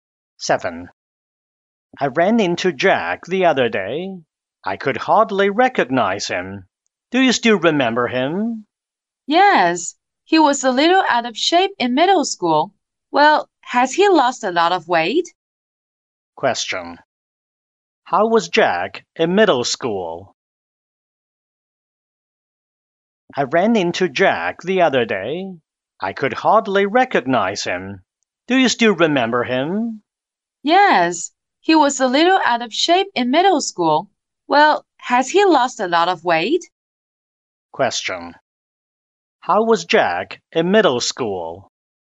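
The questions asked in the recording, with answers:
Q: How was Jack in middle school?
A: A little out of shape (overweight)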